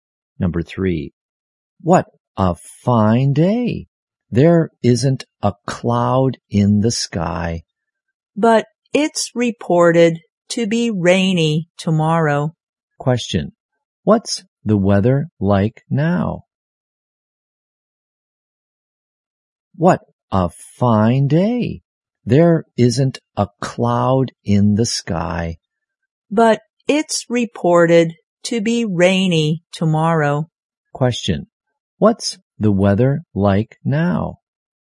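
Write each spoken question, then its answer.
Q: Question, what's the weather like now?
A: Fine and clear, with no clouds.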